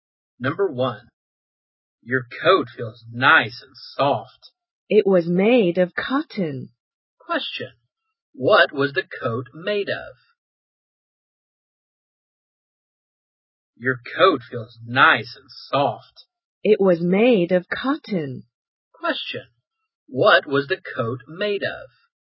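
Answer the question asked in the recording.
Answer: Cotton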